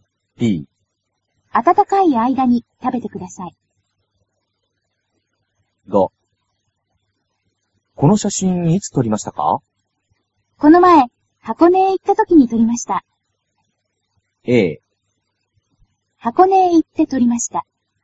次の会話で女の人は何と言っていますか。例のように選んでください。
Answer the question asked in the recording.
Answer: a

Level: cơ bản